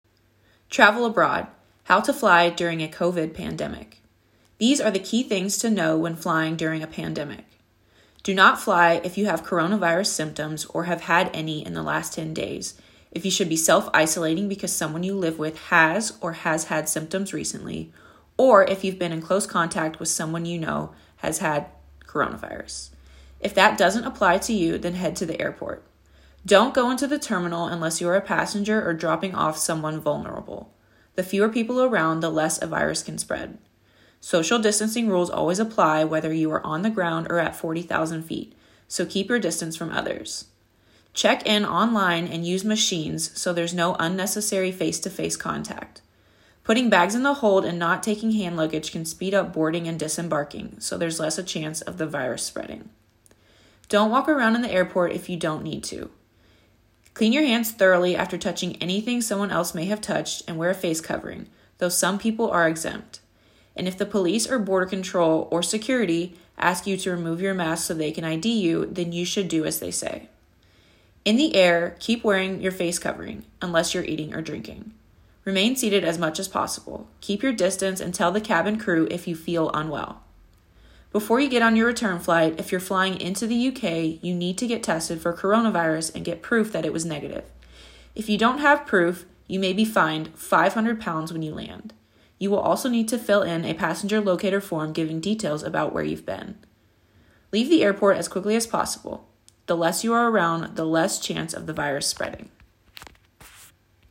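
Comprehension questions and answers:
Which of the following topics do you think she'll talk about? Copy your choices in your notebook.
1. Safety measures when embarking / disembarking.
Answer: Yes, she talks about it

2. Safety measures when eating on the plane.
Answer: Yes, she talks about it (keep your face covering on unless eating or drinking)

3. Instructions to pass security controls.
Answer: Yes, she talks about it (remove your mask if security asks, for ID)

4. Fines you may have to pay.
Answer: Yes, she talks about it (£500 without proof of a negative test)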